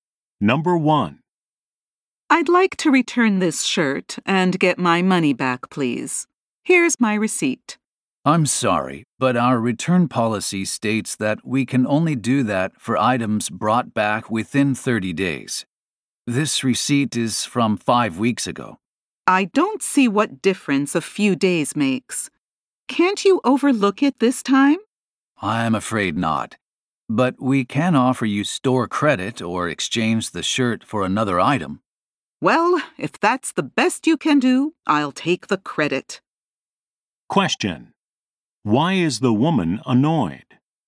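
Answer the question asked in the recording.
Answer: The store won't refund her because her receipt is over 30 days old, and she thinks a few days shouldn't matter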